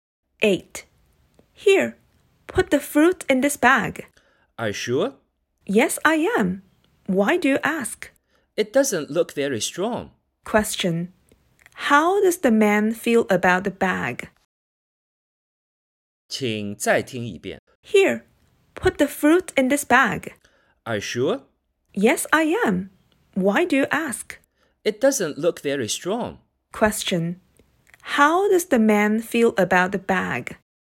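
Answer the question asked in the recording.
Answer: He thinks it isn't strong enough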